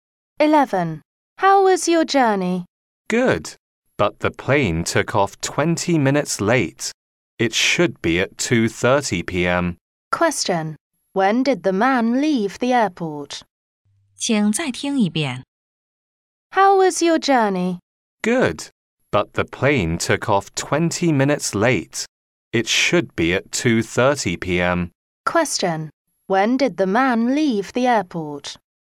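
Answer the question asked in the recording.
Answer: At 2:50 p.m.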